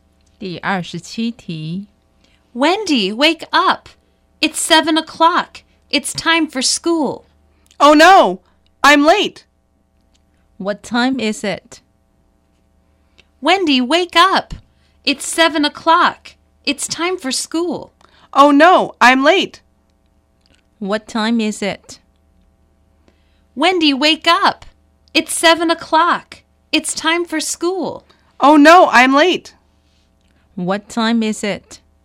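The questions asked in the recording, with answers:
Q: What time is it?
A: It's 7 o'clock.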